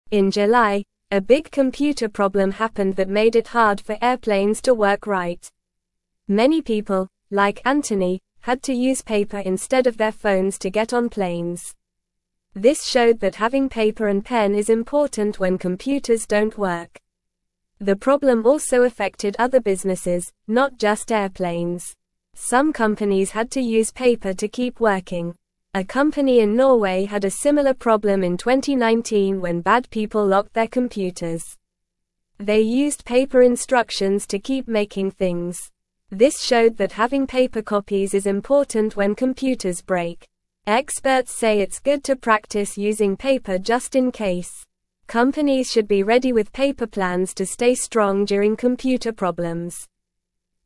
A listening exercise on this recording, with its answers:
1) In July, a big (1)______ problem happened that made it hard for airplanes to work right.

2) Many people, like Anthony, had to use paper instead of their (2)______ to get on planes.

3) This showed that (3)______ paper and pen is important when computers don't work.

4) The problem also affected other businesses, not just (4)______.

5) A company in Norway had a similar problem in 2019 when bad people (5)______ their computers.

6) They (6)______ paper instructions to keep making things.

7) This showed that having paper copies is (7)______ when computers break.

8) Experts say it's good to practice using (8)______ just in case.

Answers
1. computer
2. phones
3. having
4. airplanes
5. locked
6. used
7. important
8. paper

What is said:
In July, a big computer problem happened that made it hard for airplanes to work right. Many people, like Anthony, had to use paper instead of their phones to get on planes. This showed that having paper and pen is important when computers don't work. The problem also affected other businesses, not just airplanes. Some companies had to use paper to keep working.
A company in Norway had a similar problem in 2019 when bad people locked their computers. They used paper instructions to keep making things. Experts say it's good to practice using paper just in case. Companies should be ready with paper plans to stay strong during computer problems.

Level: Level 1